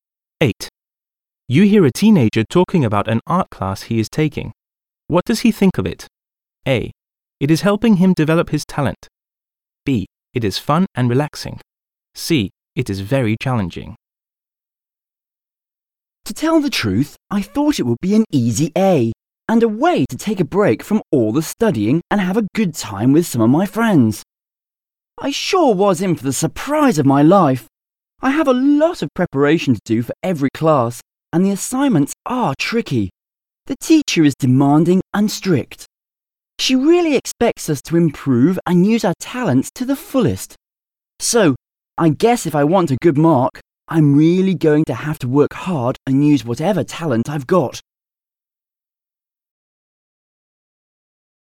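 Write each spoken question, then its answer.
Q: What does he think of it?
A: C: It is very challenging.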